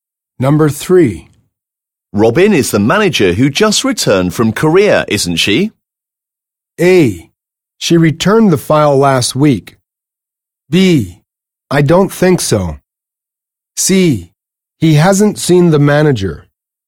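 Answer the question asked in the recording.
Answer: B: I don't think so.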